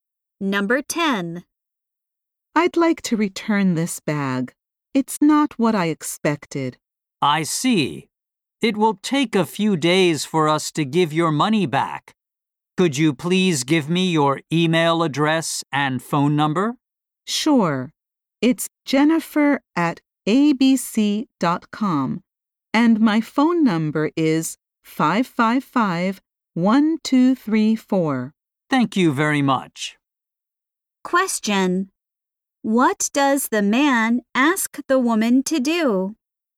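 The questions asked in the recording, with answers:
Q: What does the man ask the woman to do?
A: Give her email address and phone number.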